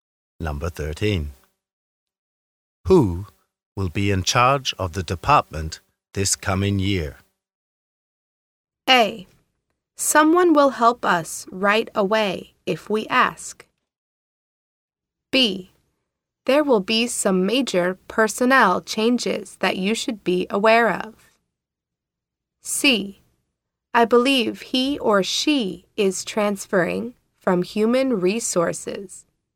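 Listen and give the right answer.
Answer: C: I believe he or she is transferring from human resources.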